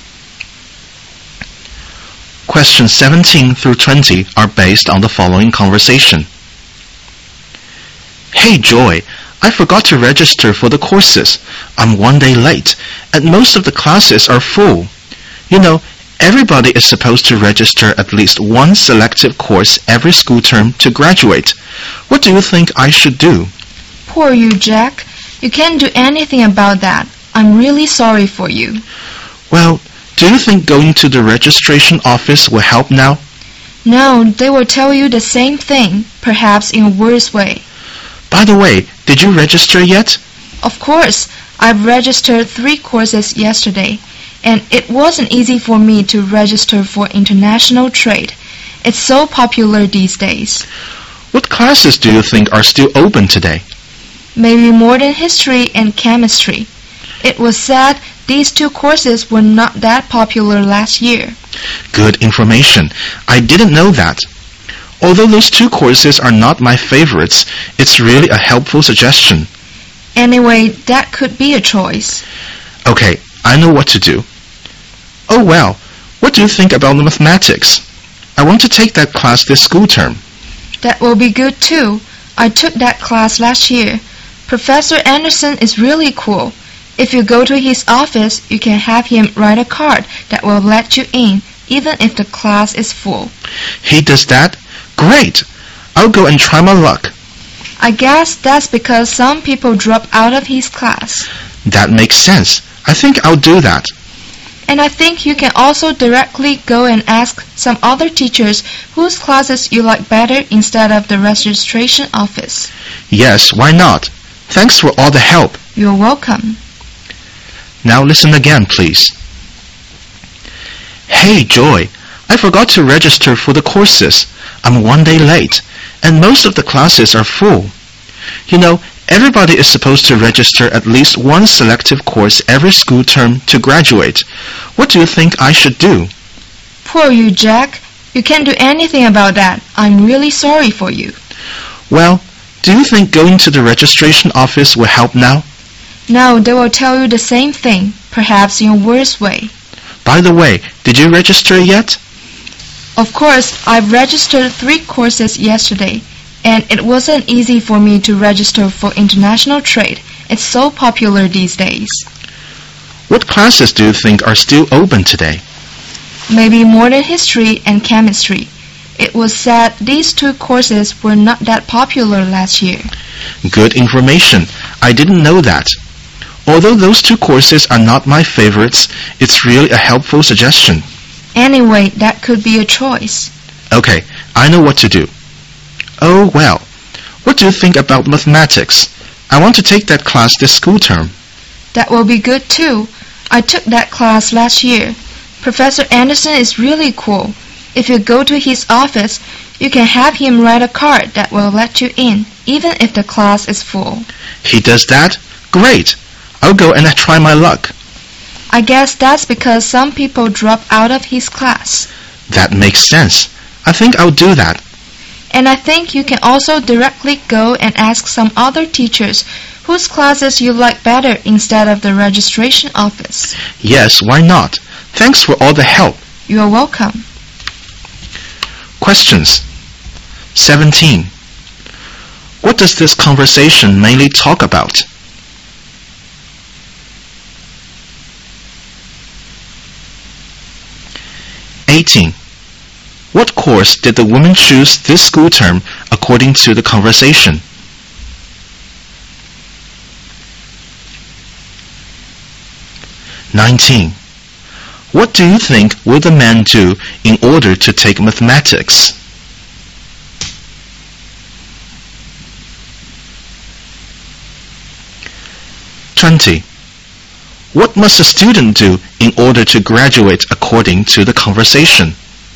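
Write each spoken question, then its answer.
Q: What does this conversation mainly talk about?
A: Registering for courses

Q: What course did the woman choose this school term according to the conversation?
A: International trade

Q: What do you think will the man do in order to take mathematics?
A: Go to Professor Anderson's office and ask him for a card to let him in

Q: What must a student do in order to graduate according to the conversation?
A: Register for at least one selective course every school term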